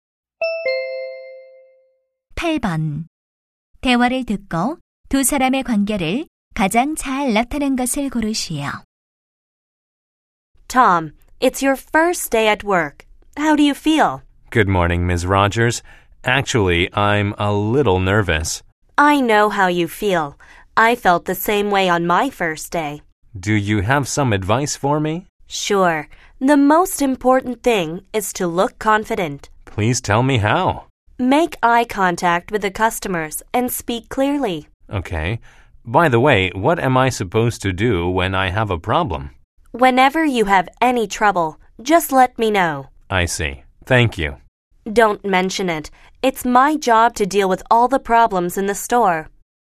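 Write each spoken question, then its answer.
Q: 대화를 듣고 두 사람의 관계를 가장 잘 나타낸 것을 고르시오.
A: 매장 관리자 - 신입 직원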